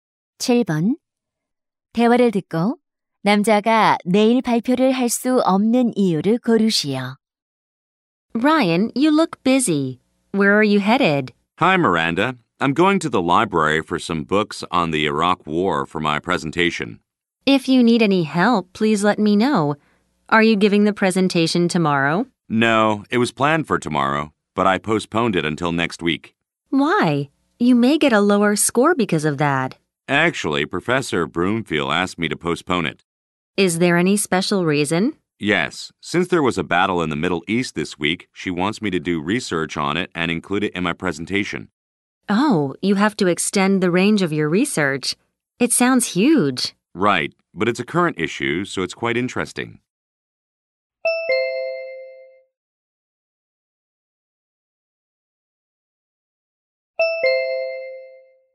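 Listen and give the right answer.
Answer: 교수님이 이번 주 중동 전투를 조사해 발표에 넣도록 연기를 요청해서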